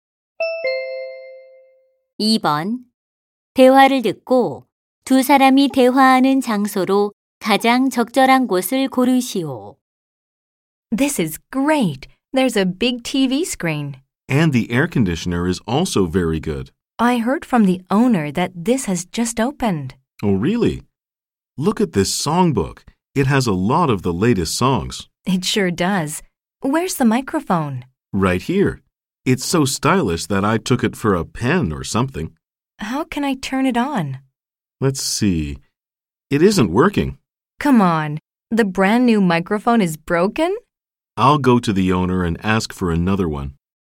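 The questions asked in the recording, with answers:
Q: 대화를 듣고 두 사람이 대화하는 장소로 가장 적절한 곳을 고르시오.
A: 노래방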